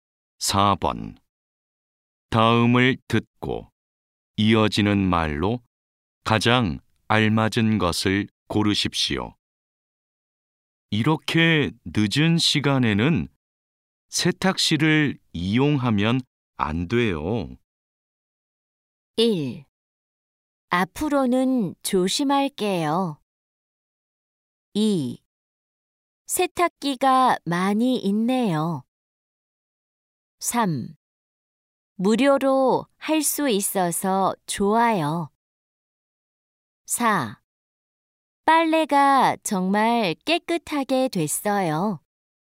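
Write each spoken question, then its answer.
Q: 다음을 듣고 이어지는 말로 가장 알맞은 것을 고르십시오.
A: 1: 앞으로는 조심할게요.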